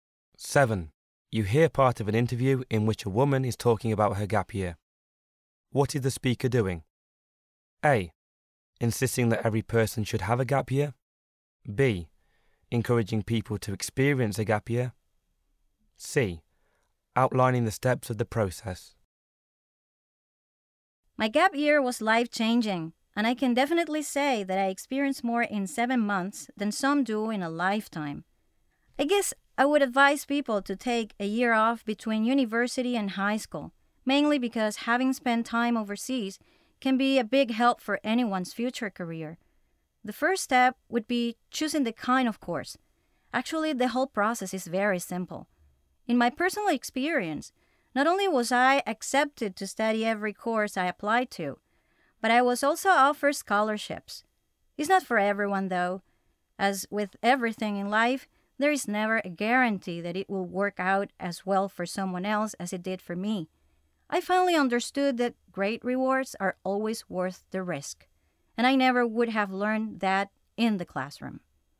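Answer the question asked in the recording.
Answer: B: Encouraging people to experience a gap year.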